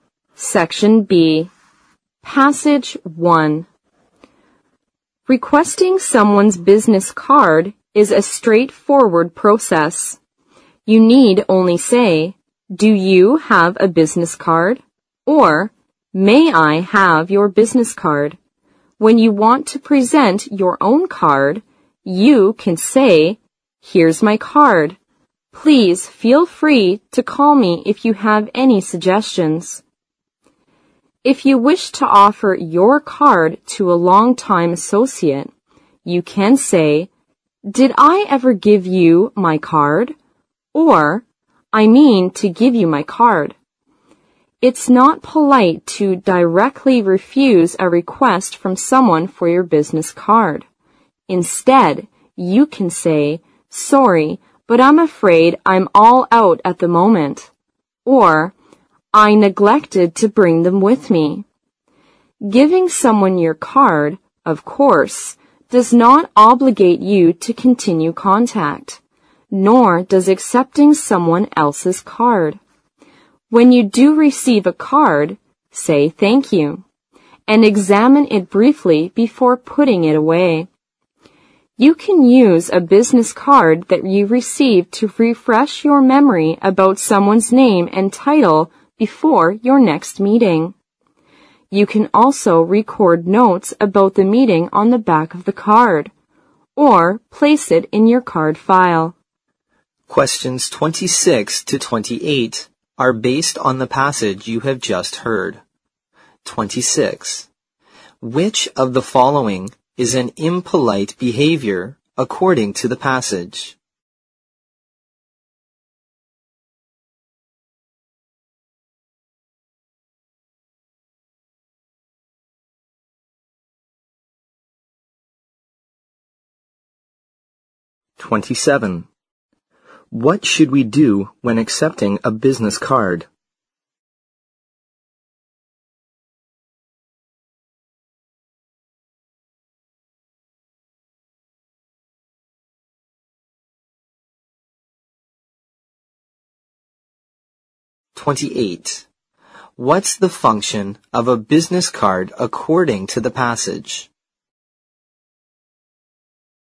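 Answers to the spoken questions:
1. Directly refusing someone's request for your business card
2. Say thank you and examine it briefly before putting it away
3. To refresh your memory about someone's name and title before the next meeting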